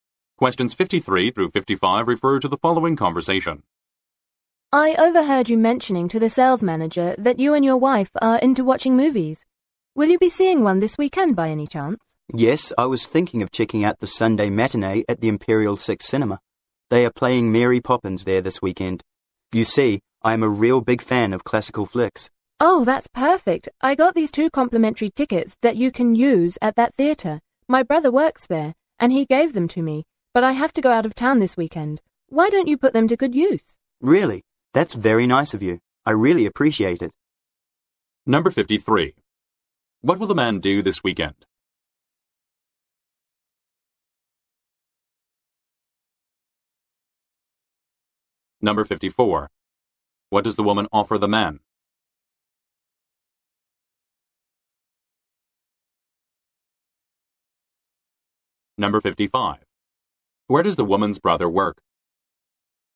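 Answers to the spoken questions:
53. See Mary Poppins at the Imperial Six Cinema
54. Two complimentary movie tickets
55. At the Imperial Six Cinema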